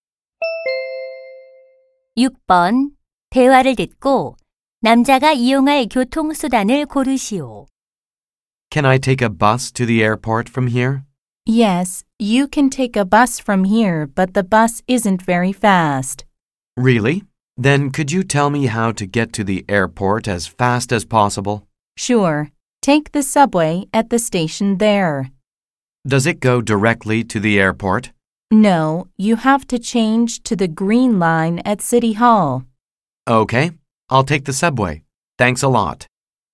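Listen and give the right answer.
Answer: 지하철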